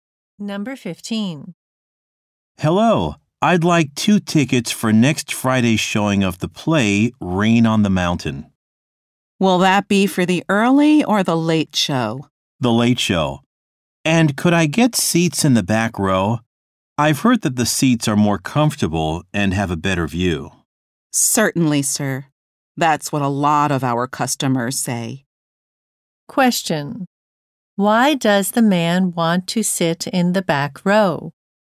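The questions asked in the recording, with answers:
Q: Why does the man want to sit in the back row?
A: The seats are more comfortable and have a better view.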